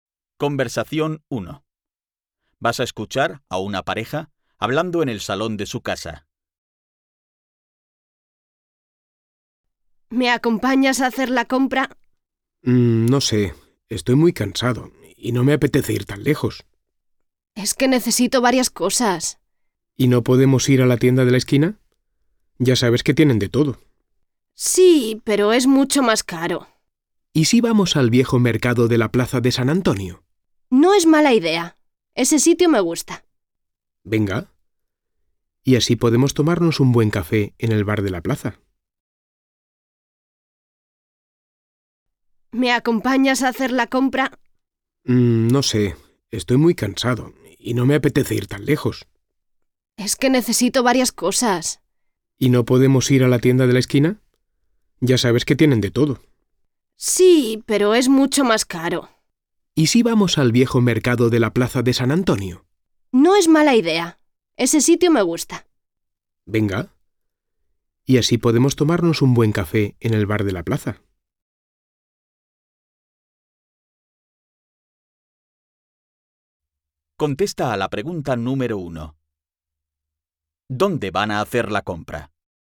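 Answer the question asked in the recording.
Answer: En el viejo mercado de la Plaza de San Antonio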